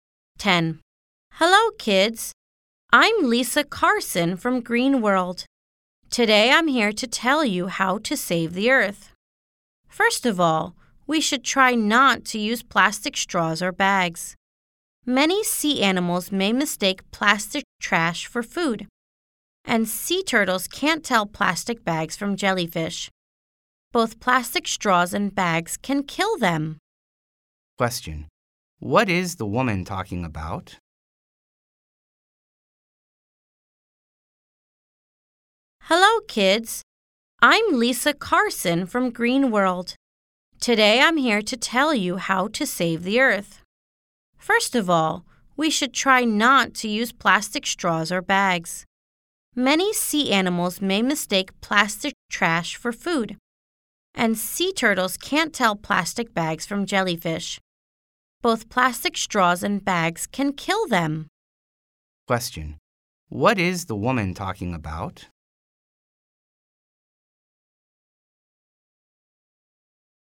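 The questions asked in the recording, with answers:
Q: What is the woman talking about?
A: How to save the Earth by not using plastic straws or bags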